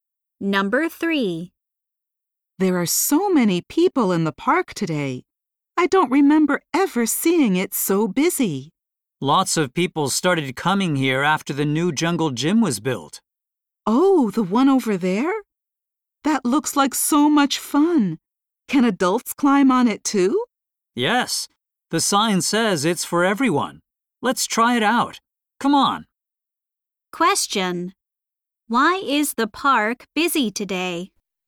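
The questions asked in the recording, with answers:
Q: Why is the park busy today?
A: A new jungle gym was built.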